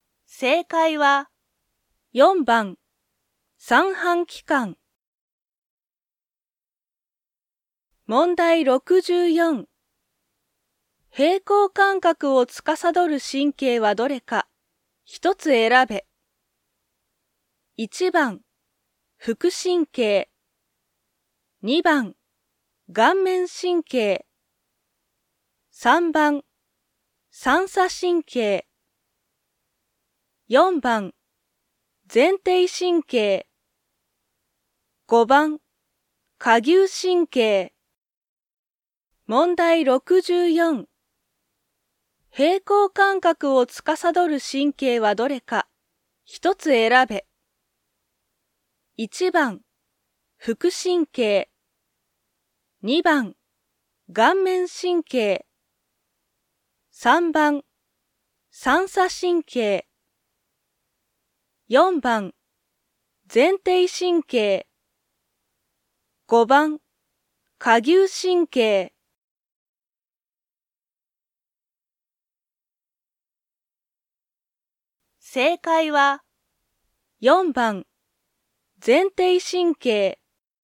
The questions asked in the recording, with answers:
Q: 平衡感覚を司る神経はどれか、一つ選べ。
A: 正解は、4番、前庭神経。